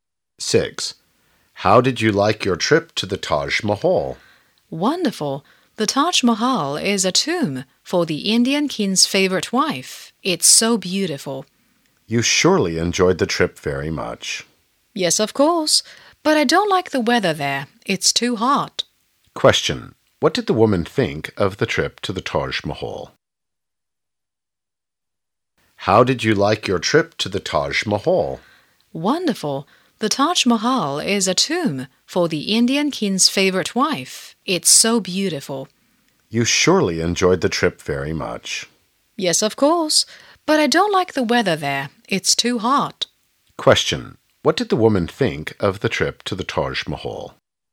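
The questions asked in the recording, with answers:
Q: What did the woman think of the trip to the Taj Mahal?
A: Wonderful, she enjoyed it very much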